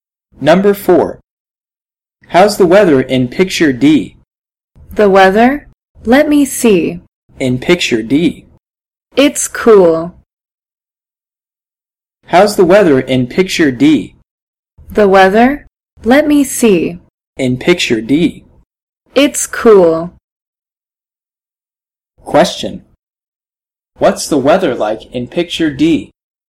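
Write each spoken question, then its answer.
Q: What's the weather like in picture D?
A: It's cool.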